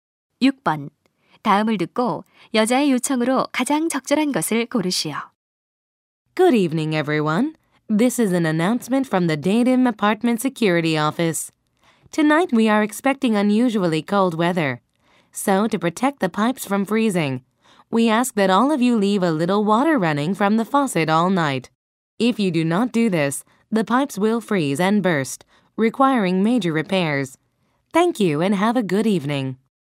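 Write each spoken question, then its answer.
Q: 다음을 듣고 여자의 요청으로 가장 적절한 것을 고르시오.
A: 밤새 수도꼭지 물을 조금 틀어 두기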